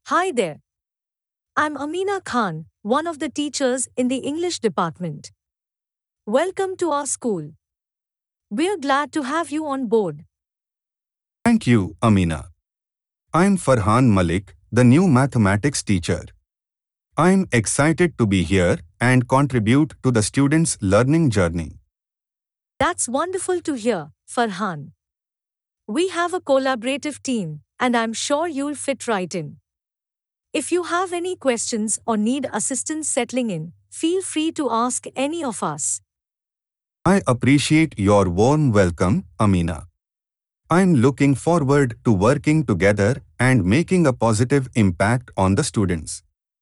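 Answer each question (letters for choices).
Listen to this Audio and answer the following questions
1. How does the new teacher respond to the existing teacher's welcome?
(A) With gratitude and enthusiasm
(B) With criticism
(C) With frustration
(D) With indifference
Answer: A

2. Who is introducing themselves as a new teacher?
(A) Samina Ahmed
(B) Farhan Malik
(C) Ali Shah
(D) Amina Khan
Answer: B

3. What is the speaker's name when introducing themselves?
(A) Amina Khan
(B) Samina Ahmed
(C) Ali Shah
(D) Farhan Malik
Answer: A

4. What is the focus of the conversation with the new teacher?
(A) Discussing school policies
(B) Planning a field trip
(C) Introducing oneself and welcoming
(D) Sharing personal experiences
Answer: C

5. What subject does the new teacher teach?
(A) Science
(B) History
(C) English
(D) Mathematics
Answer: D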